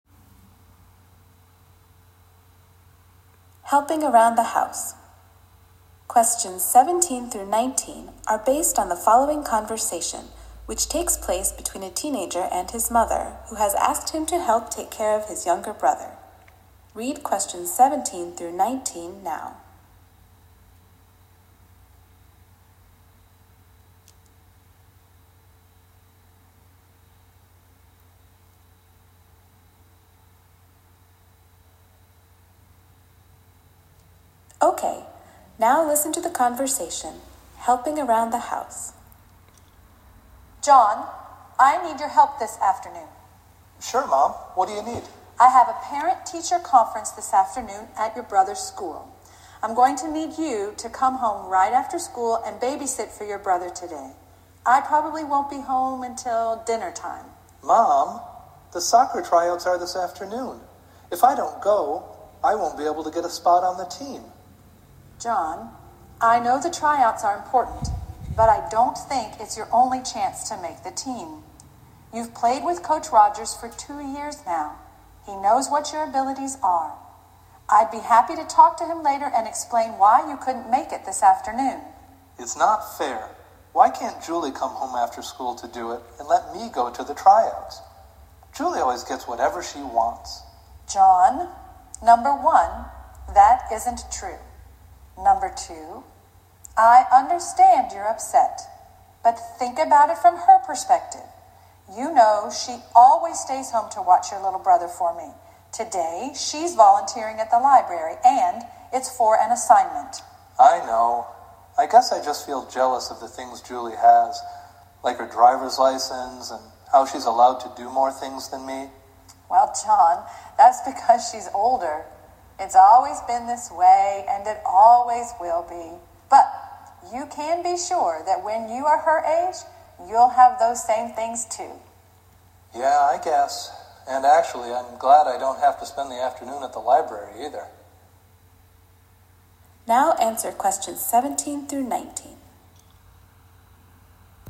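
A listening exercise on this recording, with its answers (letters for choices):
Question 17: Why is John's older sister, Julie, NOT taking care of the younger brother?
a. She usually does it and wants a break.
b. She needs to apply for a driver's license.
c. She is doing a school assignment away from home.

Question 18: What does the boy finally do in the end?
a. He refuses to help.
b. He accepts his situation.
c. He decides to help his sister.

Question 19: What does the boy feel is unfair?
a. His sister is allowed to go to the library today.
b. His sister is treated differently than him.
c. His sister always comes home later after school.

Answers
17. c
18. b
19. b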